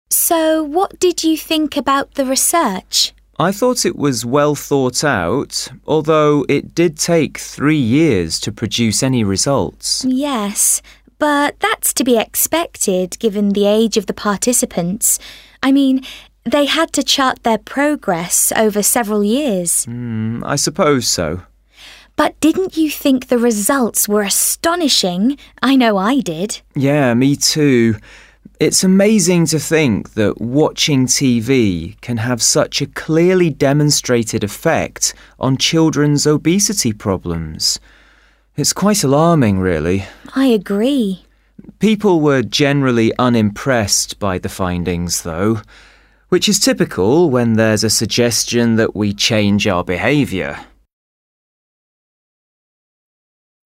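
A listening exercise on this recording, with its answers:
What aspect of the research surprised the students?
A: The findings produced by the research.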